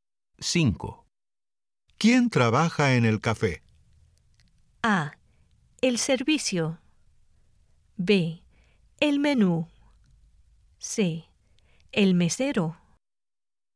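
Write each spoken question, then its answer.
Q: ¿Quién trabaja en el café?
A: C: El mesero.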